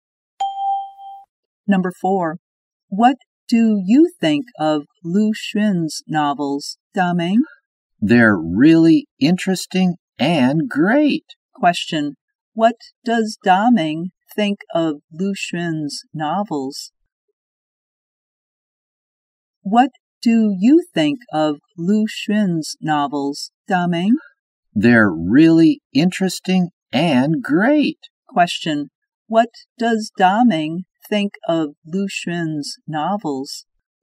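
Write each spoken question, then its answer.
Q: Question, what does Daming think of Lu Xun's novels?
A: Really interesting and great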